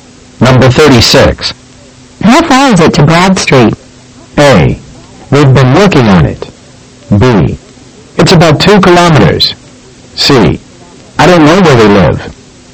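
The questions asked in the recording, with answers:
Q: How far is it to Broad Street?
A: B: It's about 2 kilometers.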